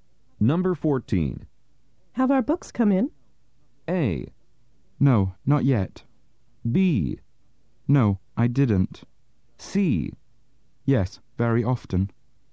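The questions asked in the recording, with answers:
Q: Have our books come in?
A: A: No, not yet.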